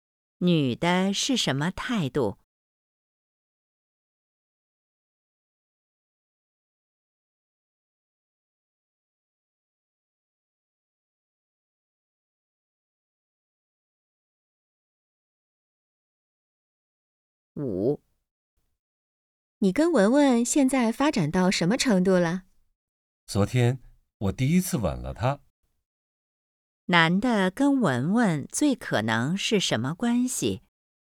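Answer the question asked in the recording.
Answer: 恋人(男女朋友)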